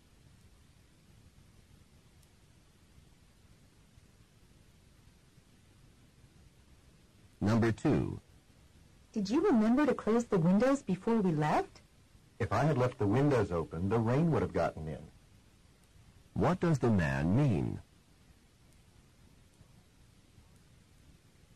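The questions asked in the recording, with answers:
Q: What does the man mean?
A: He closed the windows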